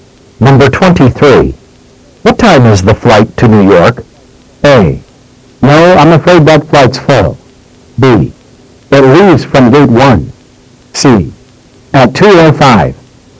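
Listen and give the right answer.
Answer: C: At 2:05.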